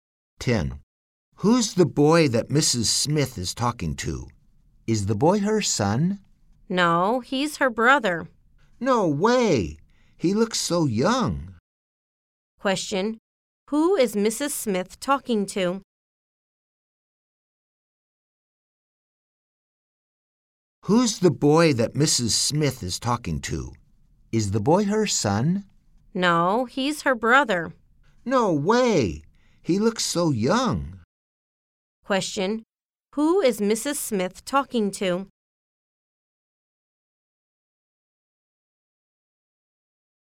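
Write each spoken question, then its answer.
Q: Who is Mrs. Smith talking to?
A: Her brother.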